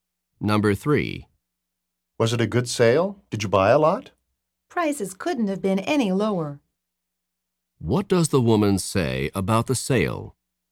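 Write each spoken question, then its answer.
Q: What does the woman say about the sale?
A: The prices were extremely low.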